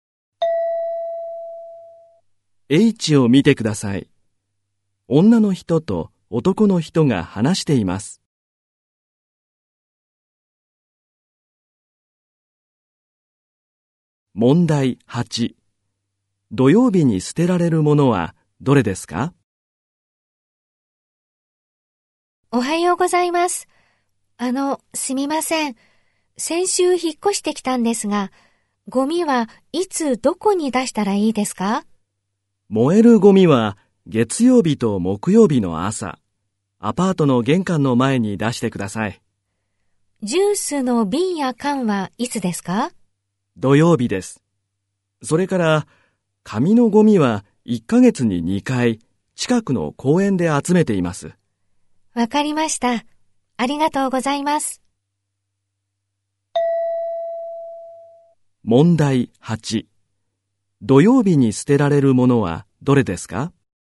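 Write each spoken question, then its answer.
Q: 土曜日に捨てられるものはどれですか?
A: ジュースの瓶や缶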